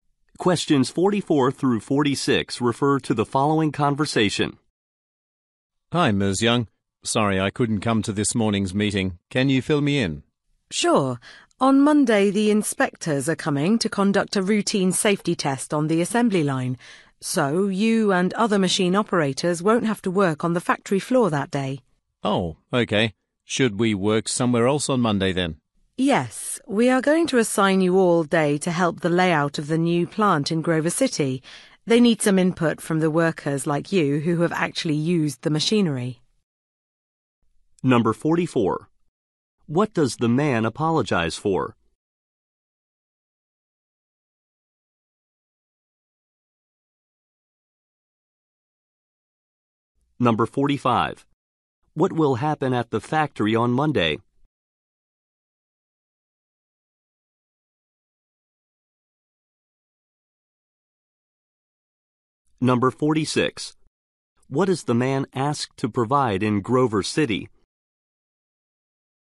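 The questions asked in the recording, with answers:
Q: What does the man apologize for?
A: Missing the morning meeting

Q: What will happen at the factory on Monday?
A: A safety inspection of the assembly line

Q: What is the man asked to provide in Grover City?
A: Input on the layout of the new plant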